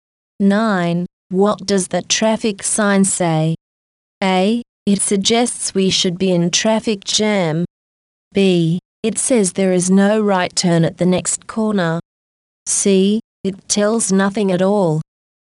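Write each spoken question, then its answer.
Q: What does the traffic sign say?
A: B: It says there is no right turn at the next corner.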